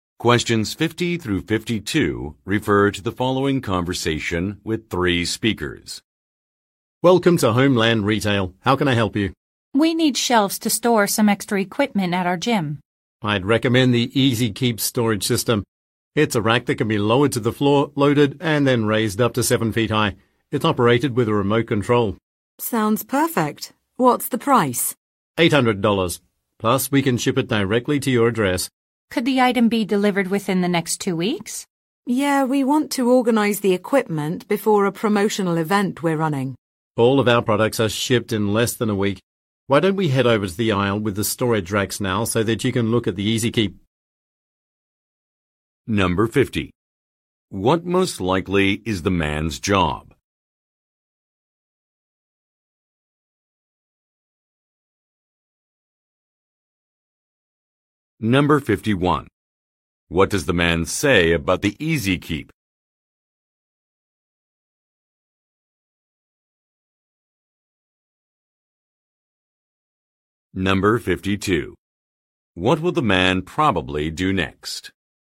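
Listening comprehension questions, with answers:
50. What most likely is the man's job?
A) Fitness instructor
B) Delivery person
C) Interior decorator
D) Sales associate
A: Sales associate

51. What does the man say about the EZ Keep?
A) It is recommended by an expert.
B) It works using a remote control.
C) It is exclusively available online.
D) It comes with free accessories.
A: It works using a remote control.

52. What will the man probably do next?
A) Contact another branch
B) Compare some items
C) Show a product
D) Look up a price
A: Show a product

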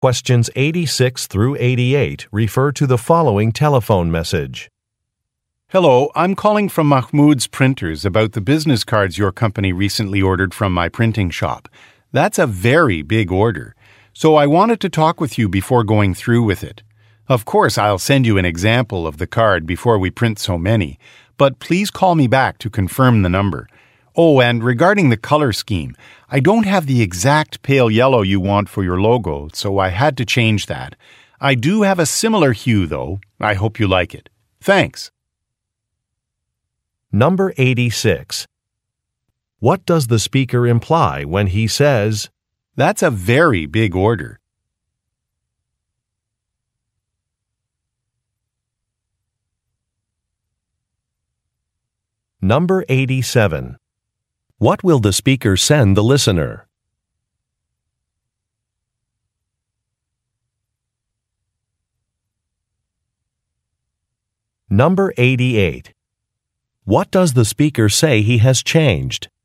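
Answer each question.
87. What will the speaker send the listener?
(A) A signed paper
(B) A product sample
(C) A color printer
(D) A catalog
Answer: A product sample

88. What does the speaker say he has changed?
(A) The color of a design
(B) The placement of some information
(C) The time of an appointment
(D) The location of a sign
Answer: The color of a design

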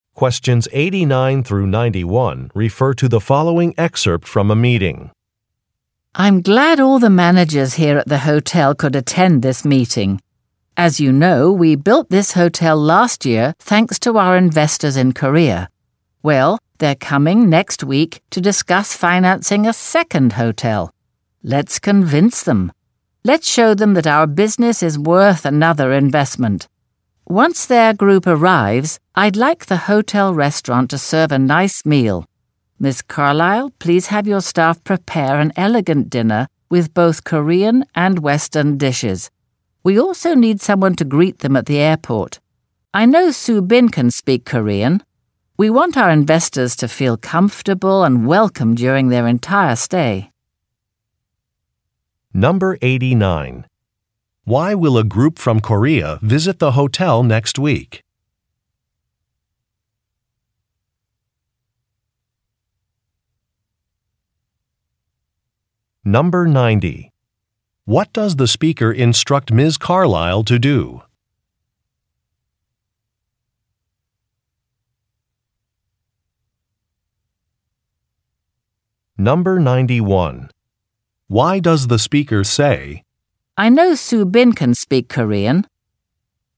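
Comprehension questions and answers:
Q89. Why will a group from Korea visit the hotel next week?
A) To perform a safety inspection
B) To attend an industry conference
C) To research a magazine article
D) To discuss a possible investment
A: To discuss a possible investment

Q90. What does the speaker instruct Ms. Carlyle to do?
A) Find new suppliers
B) Arrange a dinner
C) Train some servers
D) Purchase new uniforms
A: Arrange a dinner

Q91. Why does the speaker say, "I know Soo-Bin can speak Korean"?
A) To make a suggestion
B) To refuse an offer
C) To make an excuse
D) To correct a mistake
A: To make a suggestion

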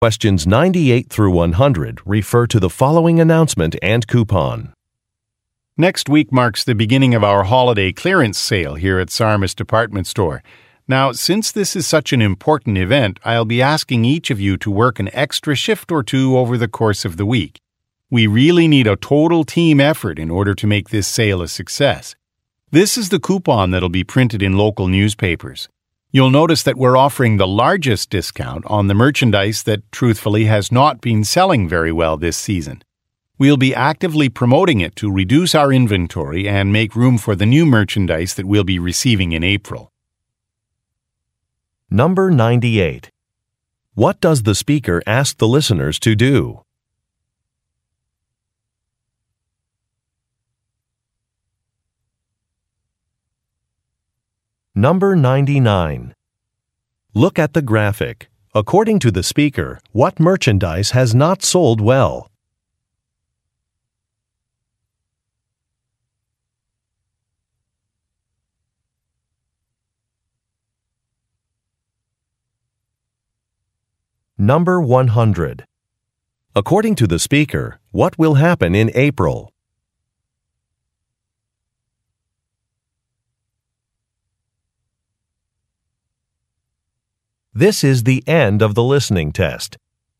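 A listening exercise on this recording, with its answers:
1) What does the speaker ask the listeners to do?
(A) Take inventory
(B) Decorate the store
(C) Work extra hours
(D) Hand out coupons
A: Work extra hours

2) According to the speaker, what will happen in April?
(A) New merchandise will be arriving.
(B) A store department will be expanded.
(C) A Web site will be improved.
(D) Employee work schedules will change.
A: New merchandise will be arriving.

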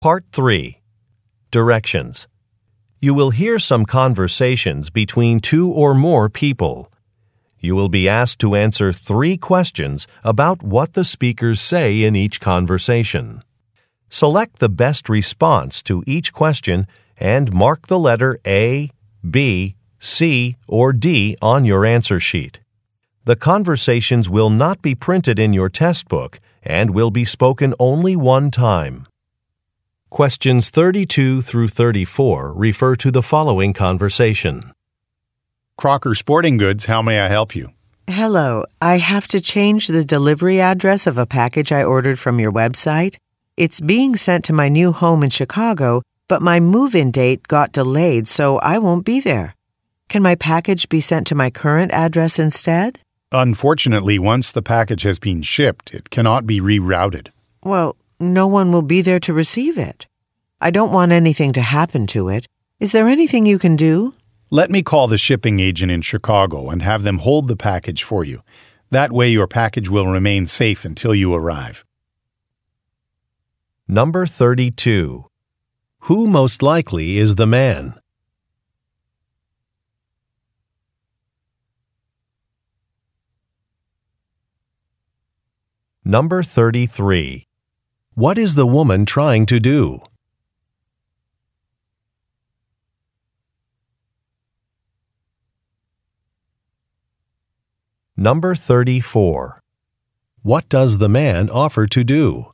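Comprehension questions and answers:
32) Who most likely is the man?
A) A Web-site designer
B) A truck driver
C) A factory worker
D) A customer service representative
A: A customer service representative

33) What is the woman trying to do?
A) Add an item to an order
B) Change a delivery location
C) Return a damaged product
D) Correct a billing error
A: Change a delivery location

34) What does the man offer to do?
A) Reimburse a purchase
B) Contact a shipping agent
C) Check a price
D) Expedite a shipment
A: Contact a shipping agent

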